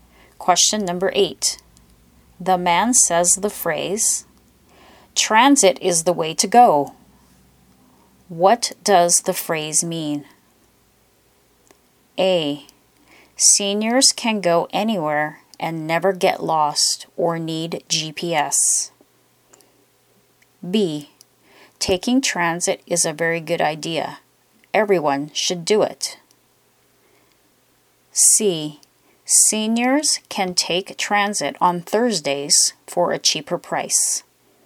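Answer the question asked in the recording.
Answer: B: taking transit is a very good idea. Everyone should do it.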